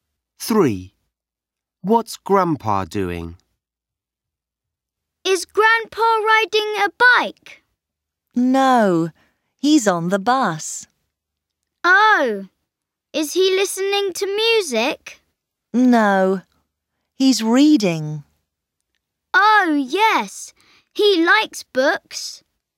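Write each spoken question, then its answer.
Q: What's Grandpa doing?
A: Reading on the bus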